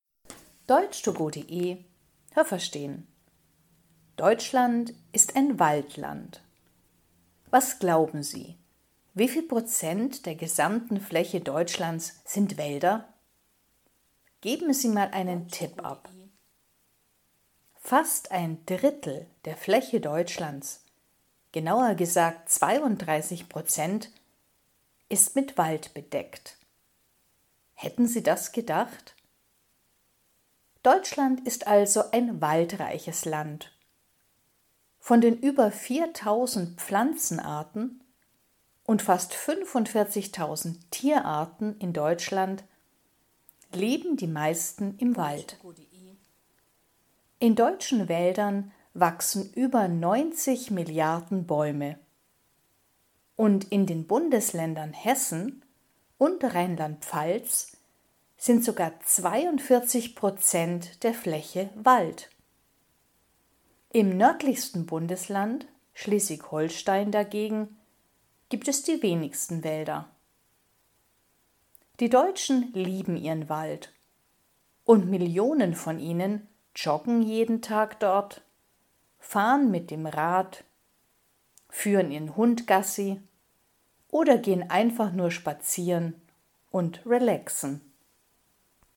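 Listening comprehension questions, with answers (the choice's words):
Was haben Sie gehört? Es gibt nur eine korrekte Antwort.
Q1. _____ der Fläche Deutschlands sind Wälder.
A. 23 Prozent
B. 32 Prozent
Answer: 32 Prozent

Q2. In Deutschland gibt es fast _____ Tierarten.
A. 4.000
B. 45.000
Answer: 45.000

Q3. In Deutschland wachsen über 90 _____ Bäume.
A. Millionen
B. Milliarden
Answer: Milliarden

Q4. In _____ sind 42 Prozent der Fläche Wälder.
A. Rheinland-Pfalz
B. Schleswig-Holstein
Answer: Rheinland-Pfalz

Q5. Im _____ Bundesland gibt es die wenigsten Wälder.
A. nördlichsten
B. südlichsten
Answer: nördlichsten

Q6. Die Deutschen ...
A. mögen ihren Wald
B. mögen ihren Wald nicht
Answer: mögen ihren Wald

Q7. Im Wald kann man ...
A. sich gut erholen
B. nur mit dem Rad fahren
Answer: sich gut erholen

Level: A2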